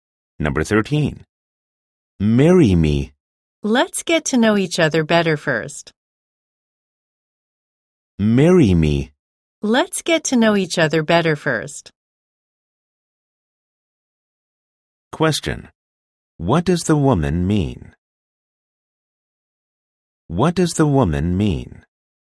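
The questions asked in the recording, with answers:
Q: What does the woman mean?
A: She is not ready to marry him yet and wants to know him better first.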